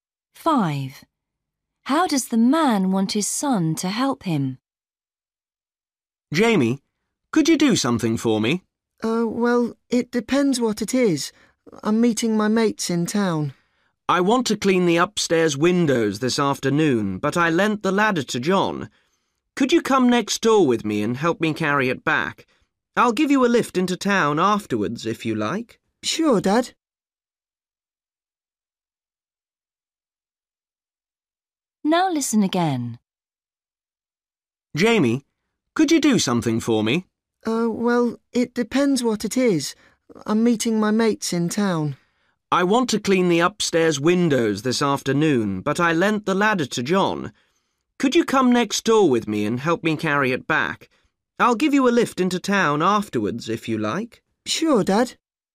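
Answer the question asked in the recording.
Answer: By helping him carry the ladder back from next door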